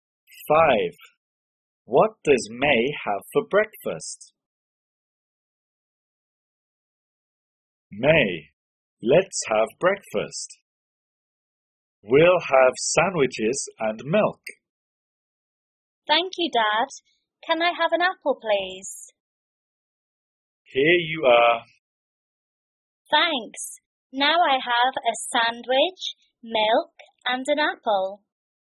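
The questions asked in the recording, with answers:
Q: What does May have for breakfast?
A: a sandwich, milk, and an apple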